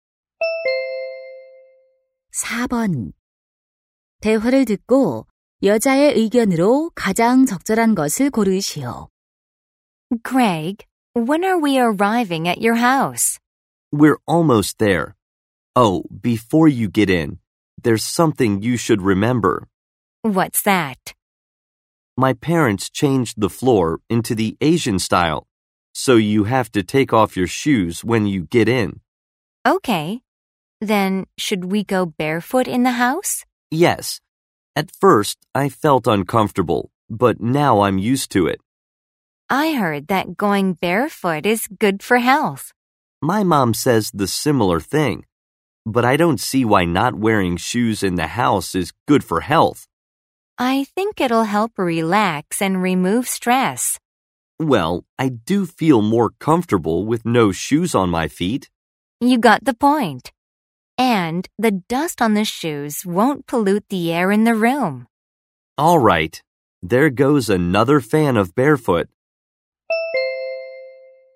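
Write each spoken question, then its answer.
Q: 대화를 듣고 여자의 의견으로 가장 적절한 것을 고르시오.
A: 집에서 맨발로 지내는 것은 건강에 좋다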